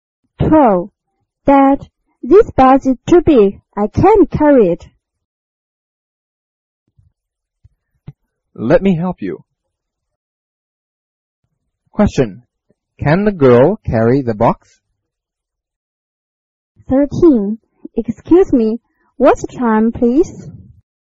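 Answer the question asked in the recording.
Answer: No, she can't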